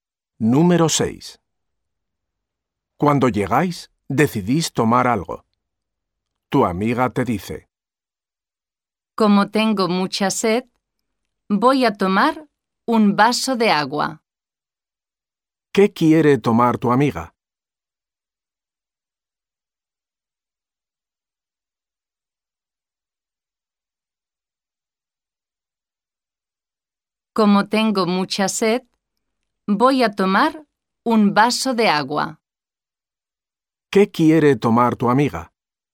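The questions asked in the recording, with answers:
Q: ¿Qué quiere tomar tu amiga?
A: Un vaso de agua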